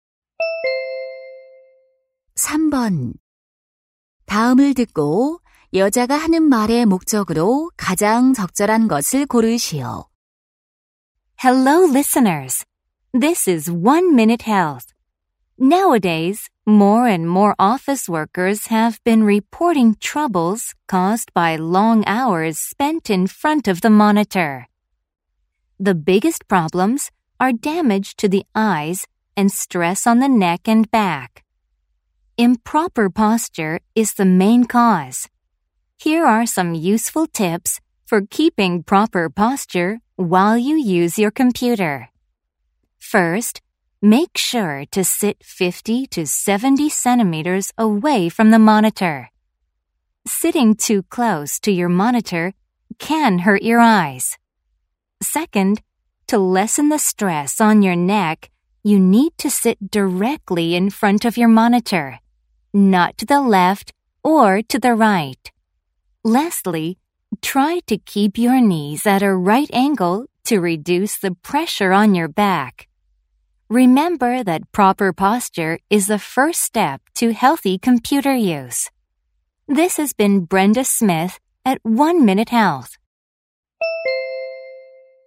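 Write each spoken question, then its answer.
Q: 다음을 듣고 여자가 하는 말의 목적으로 가장 적절한 것을 고르시오.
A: 컴퓨터 사용 시 올바른 자세를 위한 요령을 알려 주려고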